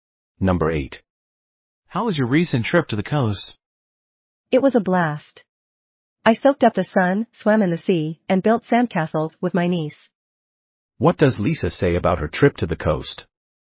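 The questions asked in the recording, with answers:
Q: What does Lisa say about her trip to the coast?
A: She had a great time.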